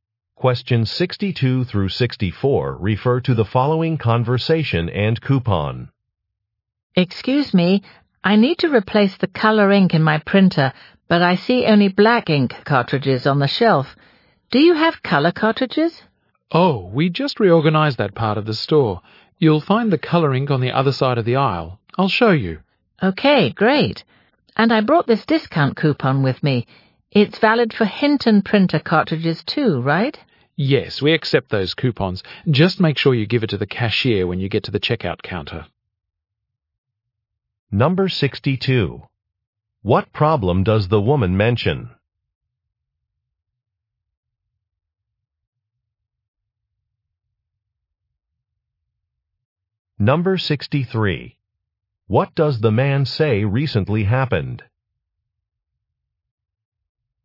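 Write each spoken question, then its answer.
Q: What problem does the woman mention?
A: She can only find black ink cartridges

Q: What does the man say recently happened?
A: That part of the store was reorganized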